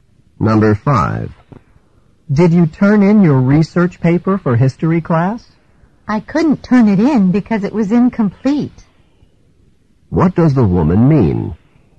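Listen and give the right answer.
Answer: She didn't turn in the paper because it wasn't finished.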